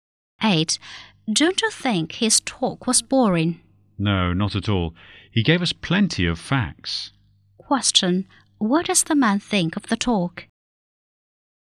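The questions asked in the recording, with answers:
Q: What does the man think of the talk?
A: It was informative, not boring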